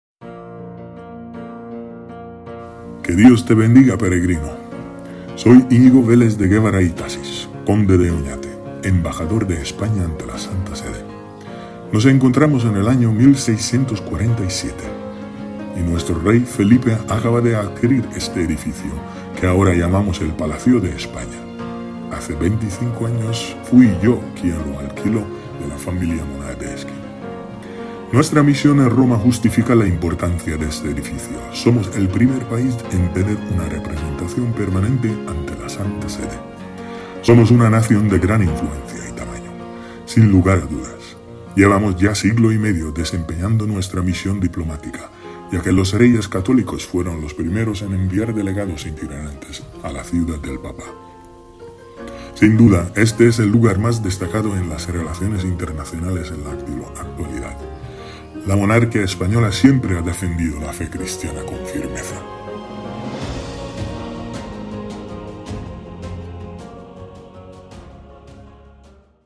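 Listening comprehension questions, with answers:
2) ¿Cuál es la razón del nombre "española" de la plaza?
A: La presencia de la embajada de España ante la Santa Sede

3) ¿Qué monarca español estableció la primera embajada ante la Santa Sede?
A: Los Reyes Católicos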